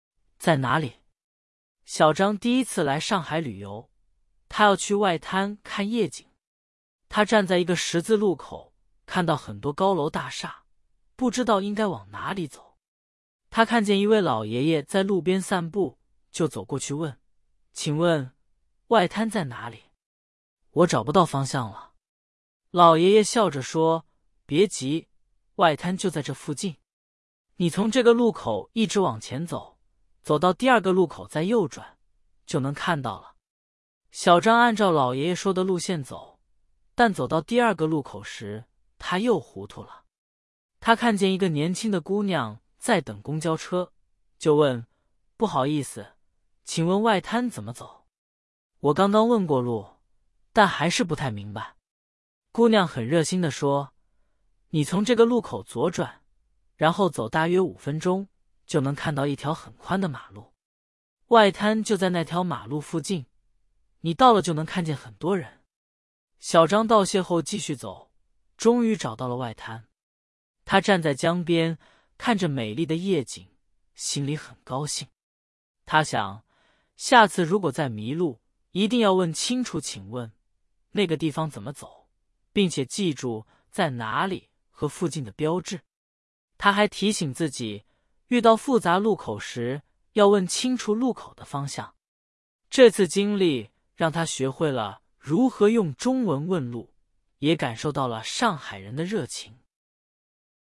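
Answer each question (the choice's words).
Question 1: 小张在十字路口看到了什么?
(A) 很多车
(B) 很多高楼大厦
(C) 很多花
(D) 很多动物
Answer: 很多高楼大厦

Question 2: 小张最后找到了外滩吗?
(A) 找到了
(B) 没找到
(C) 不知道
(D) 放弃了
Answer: 找到了

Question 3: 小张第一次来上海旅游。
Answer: 对

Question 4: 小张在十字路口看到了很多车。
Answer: 错

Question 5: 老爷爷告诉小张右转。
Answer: 对(先直走,到第二个路口再右转)

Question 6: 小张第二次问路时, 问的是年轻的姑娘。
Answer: 对

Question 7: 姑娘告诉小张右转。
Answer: 错

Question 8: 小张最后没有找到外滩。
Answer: 错

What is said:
在哪里
小张第一次来上海旅游,他要去外滩看夜景。他站在一个十字路口,看到很多高楼大厦,不知道应该往哪里走。他看见一位老爷爷在路边散步,就走过去问:"请问,外滩在哪里?我找不到方向了。"老爷爷笑着说:"别急,外滩就在这附近。你从这个路口一直往前走,走到第二个路口再右转,就能看到了。
小张按照老爷爷说的路线走,但走到第二个路口时,他又糊涂了。他看见一个年轻的姑娘在等公交车,就问:"不好意思,请问外滩怎么走?我刚刚问过路,但还是不太明白。"姑娘很热心地说:"你从这个路口左转,然后走大约五分钟,就能看到一条很宽的马路。外滩就在那条马路附近,你到了就能看见很多人。
小张道谢后继续走,终于找到了外滩。他站在江边,看着美丽的夜景,心里很高兴。他想,下次如果再迷路,一定要问清楚"请问,那个地方怎么走",并且记住"在哪里"和"附近"的标志。他还提醒自己,遇到复杂路口时,要问清楚"路口"的方向。这次经历让他学会了如何用中文问路,也感受到了上海人的热情。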